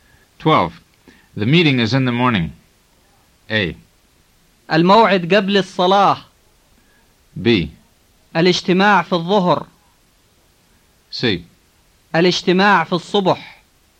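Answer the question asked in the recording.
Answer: C: الاجتماع في الصبح.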